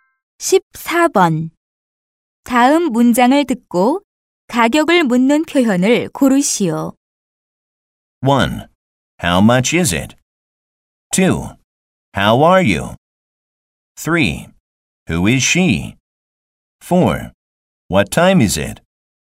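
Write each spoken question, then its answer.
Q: 다음 문장을 듣고 가격을 묻는 표현을 고르시오.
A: 1: How much is it?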